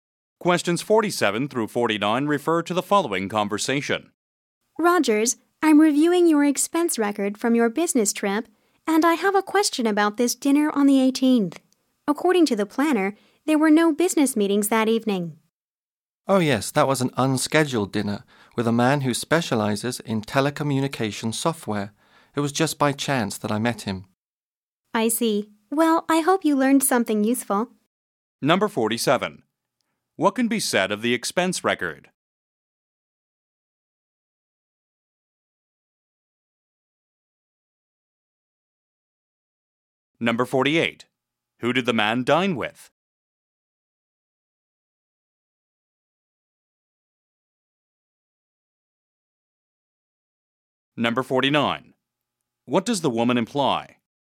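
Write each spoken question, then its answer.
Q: Who did the man dine with?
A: A telecommunication software specialist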